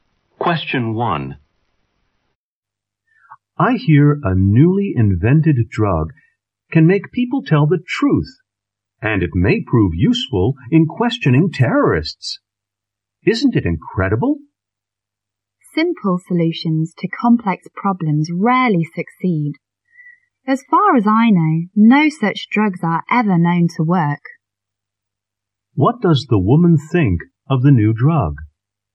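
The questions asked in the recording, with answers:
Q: What does the woman think of the new drug?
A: She doubts it will work.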